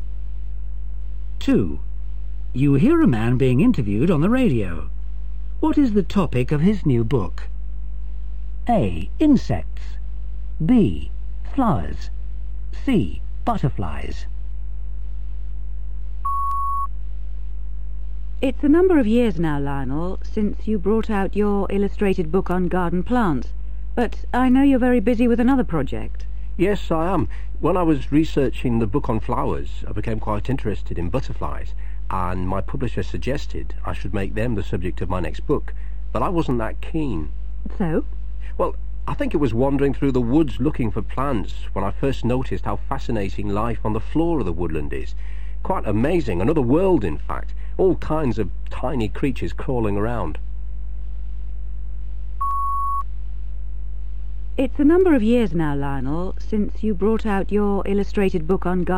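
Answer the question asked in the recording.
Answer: A: Insects.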